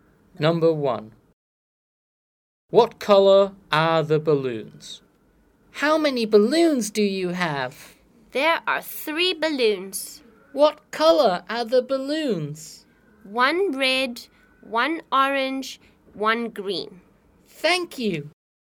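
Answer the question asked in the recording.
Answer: 1 red, 1 orange, 1 green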